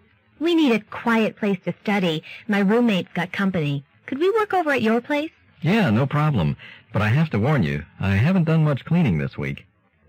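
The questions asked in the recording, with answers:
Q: What does the man imply?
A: They can study at his place, though it is messy.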